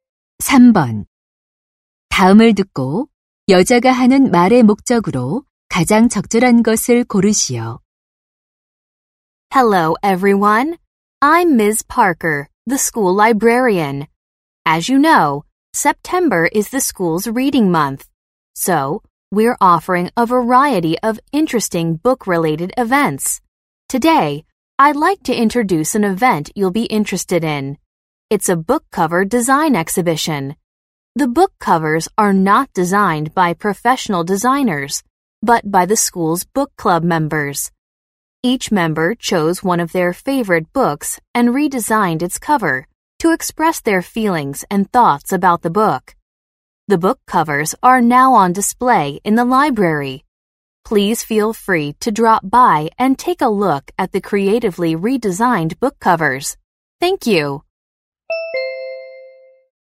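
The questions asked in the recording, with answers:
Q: 다음을 듣고 여자가 하는 말의 목적으로 가장 적절한 것을 고르시오.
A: 도서 표지 디자인 전시회를 소개하려고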